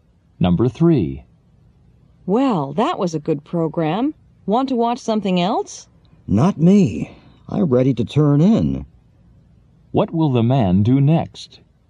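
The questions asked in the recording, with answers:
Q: What will the man do next?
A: Go to bed.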